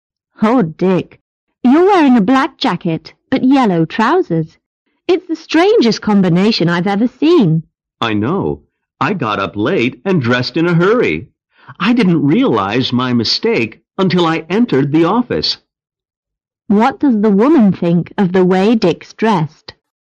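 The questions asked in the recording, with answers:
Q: What does the woman think of the way Dick's dressed?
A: It's a very strange combination.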